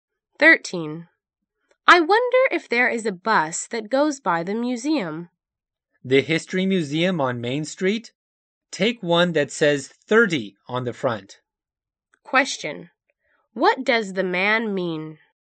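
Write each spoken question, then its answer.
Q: What does the man mean?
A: Bus number 30 goes by the museum.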